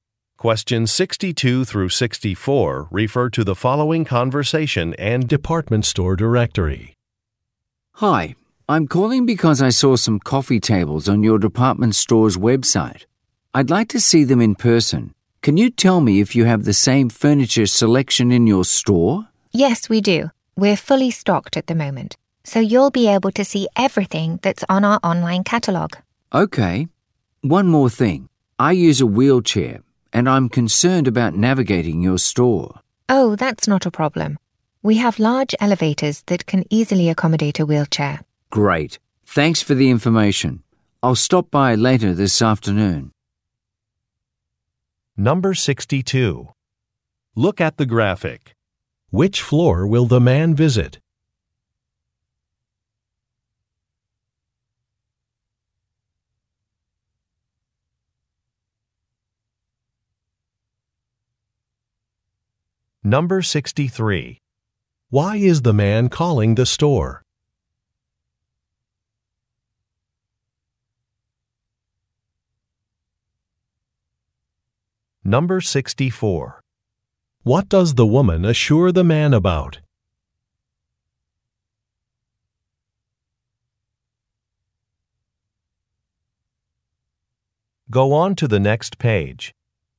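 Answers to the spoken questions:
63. To ask if the store has the same furniture as the website
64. The elevators can accommodate a wheelchair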